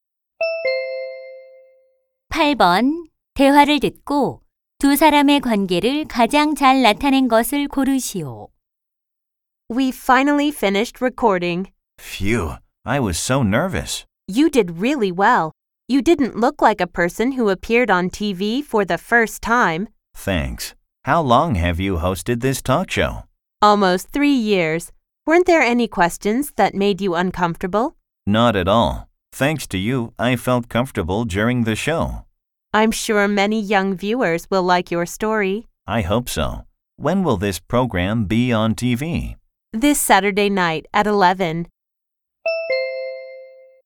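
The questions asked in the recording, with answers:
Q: 대화를 듣고 두 사람의 관계를 가장 잘 나타낸 것을 고르시오.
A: 토크쇼 진행자와 출연자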